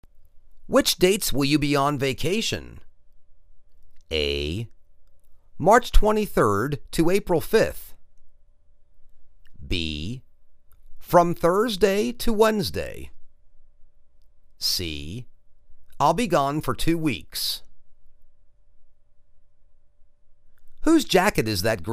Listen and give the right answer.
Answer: March 23rd to April 5th.